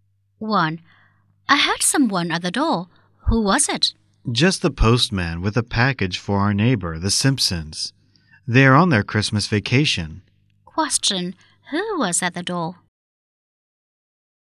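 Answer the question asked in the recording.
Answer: The postman.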